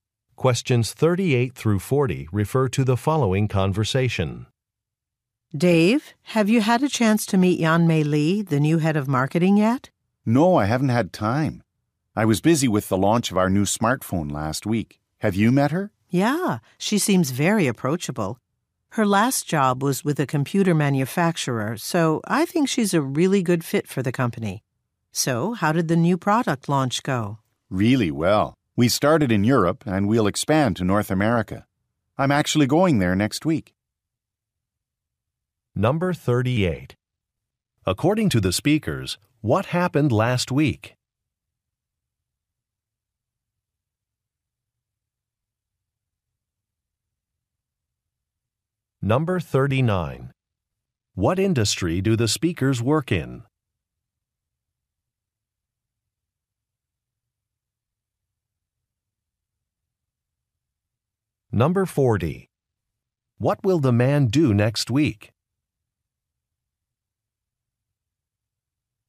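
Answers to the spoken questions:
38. A new smartphone was launched
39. Electronics / mobile phones
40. Travel to North America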